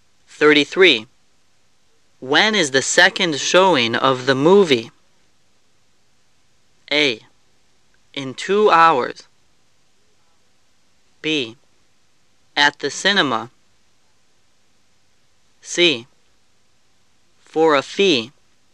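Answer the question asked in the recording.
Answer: A: In 2 hours.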